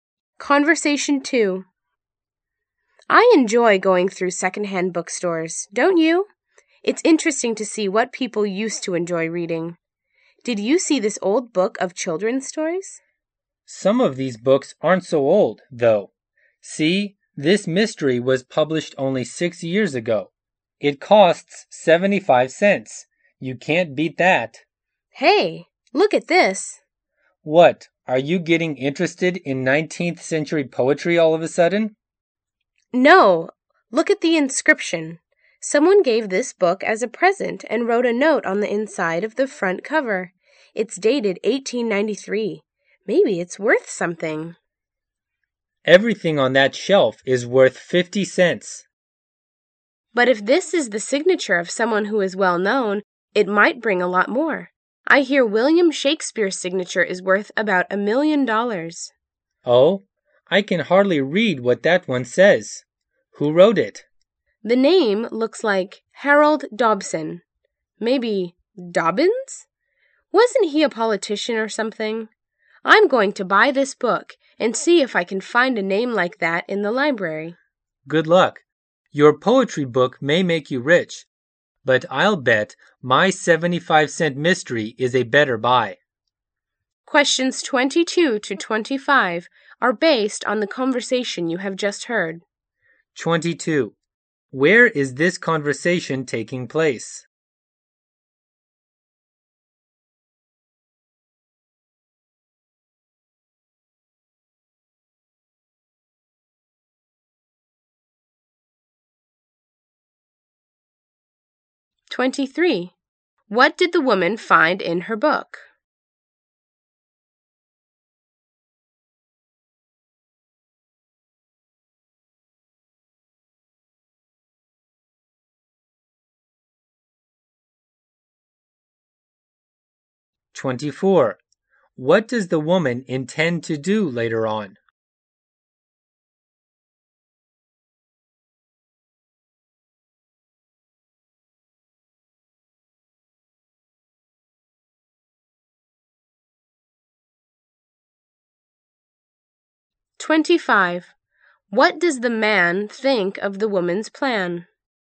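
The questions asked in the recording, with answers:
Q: Where is this conversation taking place?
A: In a secondhand bookstore

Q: What did the woman find in her book?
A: A handwritten inscription dated 1893

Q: What does the woman intend to do later on?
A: Look up the signer's name in the library

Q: What does the man think of the woman's plan?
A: He doubts it; he thinks his 75-cent mystery is a better buy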